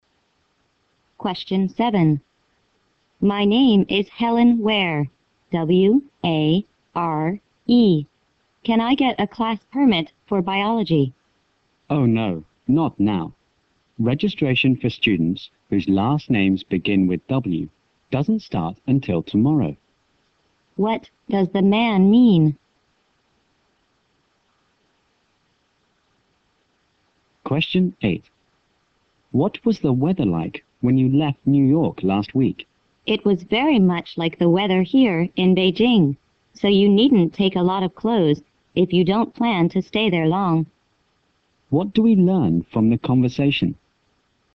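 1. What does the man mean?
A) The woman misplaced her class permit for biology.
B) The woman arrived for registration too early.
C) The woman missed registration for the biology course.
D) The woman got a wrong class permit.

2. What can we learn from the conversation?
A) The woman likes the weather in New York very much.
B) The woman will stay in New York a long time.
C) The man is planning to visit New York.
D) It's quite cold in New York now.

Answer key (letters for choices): 1B, 2C

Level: 英语四级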